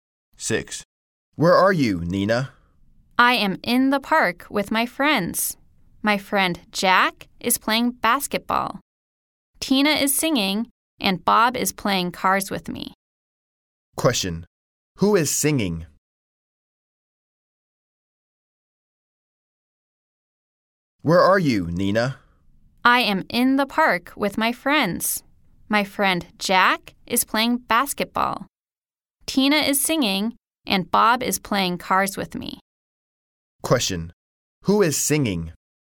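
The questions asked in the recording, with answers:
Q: Who is singing?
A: Tina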